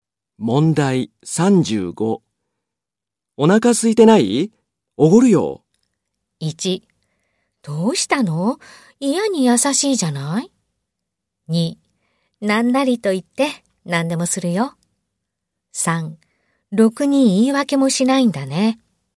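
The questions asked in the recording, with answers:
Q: お腹空いてない?おごるよ。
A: 1: どうしたの?嫌に優しいじゃない?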